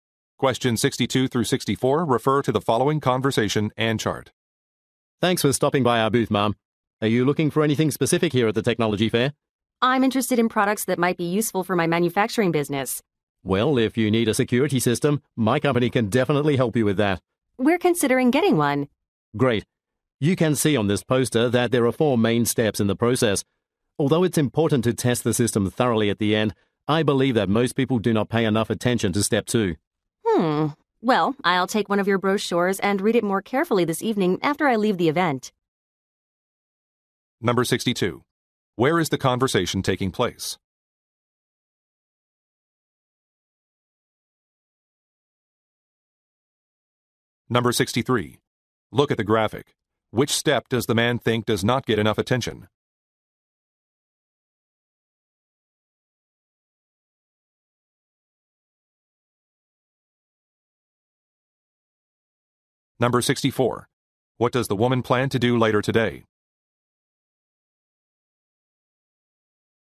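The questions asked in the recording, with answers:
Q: Where is the conversation taking place?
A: At a technology fair

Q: What does the woman plan to do later today?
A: Read a brochure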